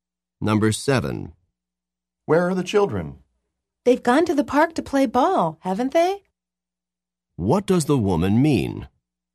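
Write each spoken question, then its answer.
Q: What does the woman mean?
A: She thinks the children went to the park to play ball, but isn't sure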